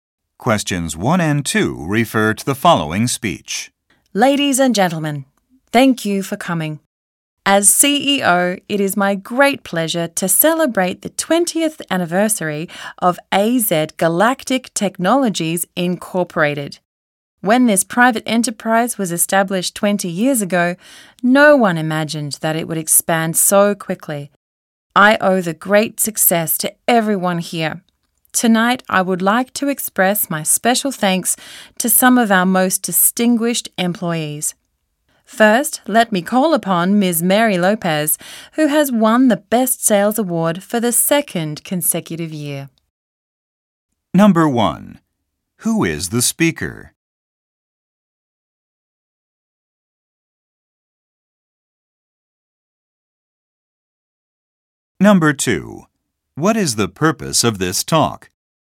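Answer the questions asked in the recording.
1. The CEO of AZ Galactic Technologies
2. To celebrate the company's 20th anniversary and thank distinguished employees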